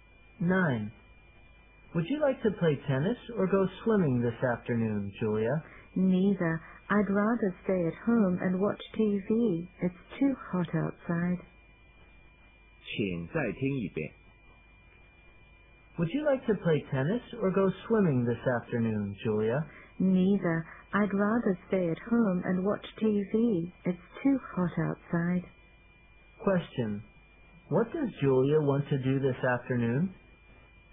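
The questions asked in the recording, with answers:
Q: Question. What does Julia want to do this afternoon?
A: Stay at home and watch TV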